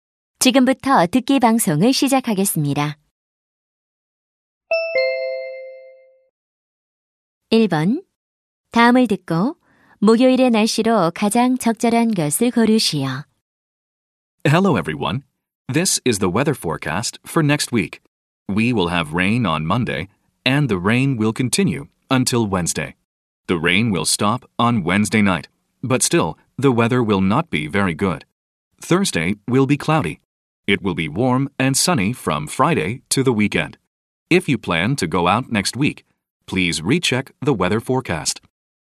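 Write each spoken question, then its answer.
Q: 다음을 듣고 목요일의 날씨로 가장 적절한 것을 고르시오.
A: 흐림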